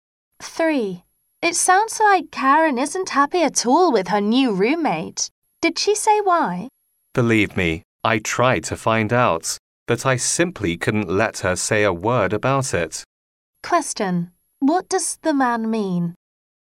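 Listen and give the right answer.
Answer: Karen wouldn't say why she is unhappy.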